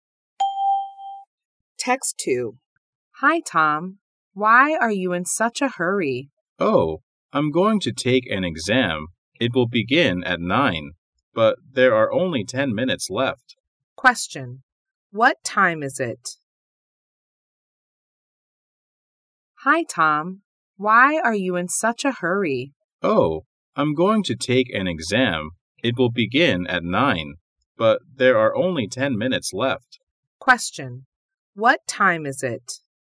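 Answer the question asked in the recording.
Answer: 8:50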